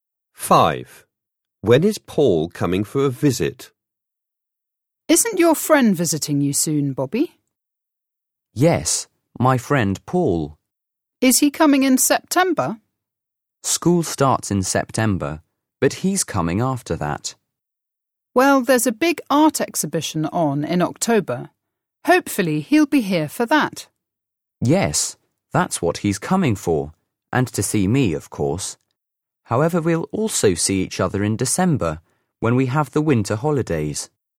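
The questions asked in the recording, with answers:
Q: When is Paul coming for a visit?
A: in October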